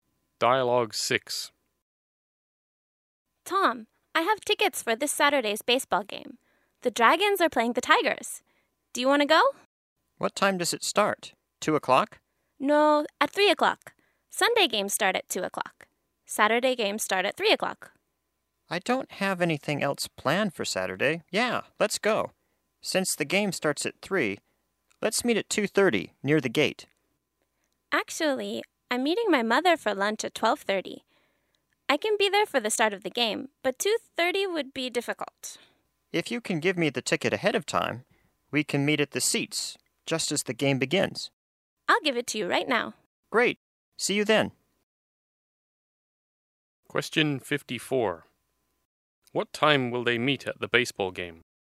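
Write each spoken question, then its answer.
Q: What time will they meet at the baseball game?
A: 3 o'clock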